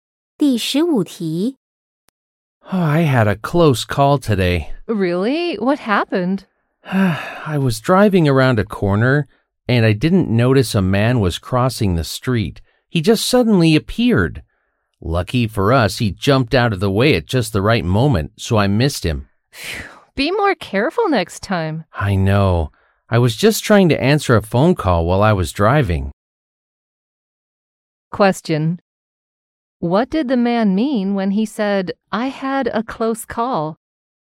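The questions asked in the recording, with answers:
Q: What did the man mean when he said, I had a close call?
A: He almost hit a man with his car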